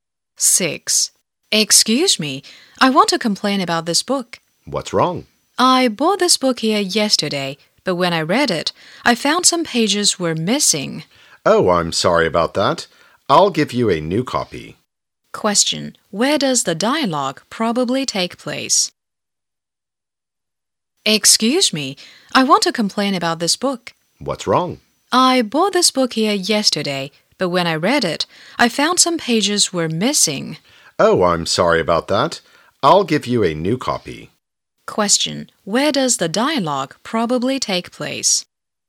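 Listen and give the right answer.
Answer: In a bookshop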